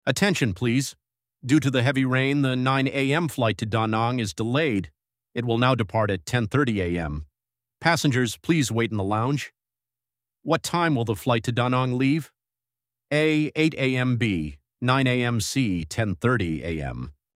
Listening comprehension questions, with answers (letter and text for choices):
What time will the flight to Da Nang leave?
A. 8:00 AM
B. 9:00 AM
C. 10:30 AM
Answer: C. 10:30 AM

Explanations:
Đáp án B là thời gian dự kiến ban đầu, đáp án C mới là thời gian thực tế. Đây là cấu trúc thông báo điển hình của bài thi VSTEP.

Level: A2